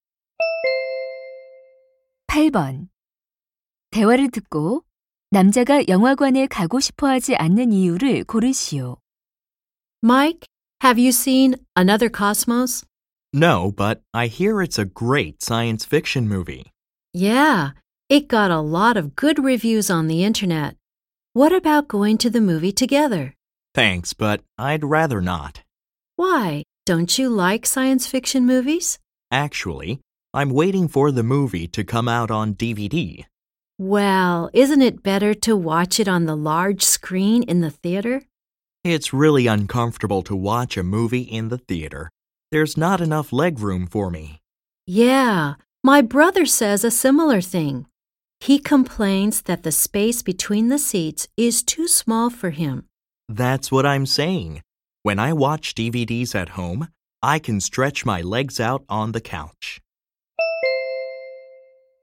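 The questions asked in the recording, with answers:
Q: 대화를 듣고 남자가 영화관에 가고 싶어 하지 않는 이유를 고르시오.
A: 좌석 간 다리 공간이 좁아 불편해서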